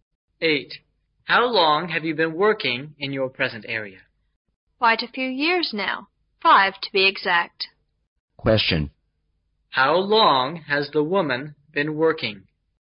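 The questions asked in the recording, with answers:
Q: How long has the woman been working?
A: 5 years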